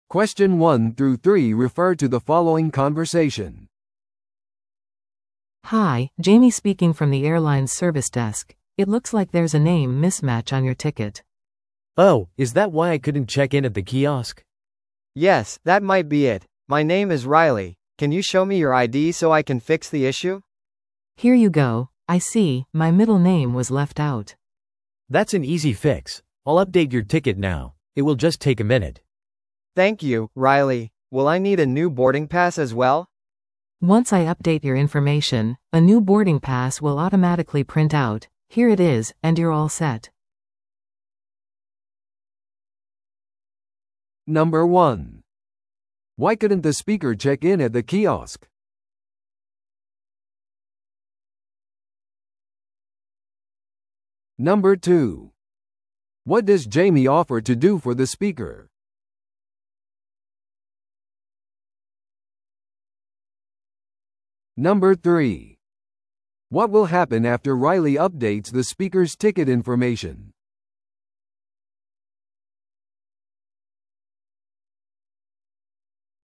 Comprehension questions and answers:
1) Why couldn't the speaker check in at the kiosk?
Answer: チケットに名前の不一致があった。

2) What does Jamie offer to do for the speaker?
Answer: 正しい名前でチケットを更新する。

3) What will happen after Riley updates the speaker's ticket information?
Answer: 新しい搭乗券がすぐに印刷される。

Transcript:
A: Hi, Jamie speaking from the airline's service desk. It looks like there's a name mismatch on your ticket.
B: Oh, is that why I couldn't check in at the kiosk?
C: Yes, that might be it. My name is Riley. Can you show me your ID so I can fix the issue?
A: Here you go. I see, my middle name was left out.
B: That's an easy fix. I'll update your ticket now. It will just take a minute.
C: Thank you, Riley. Will I need a new boarding pass as well?
A: Once I update your information, a new boarding pass will automatically print out. Here it is, and you're all set!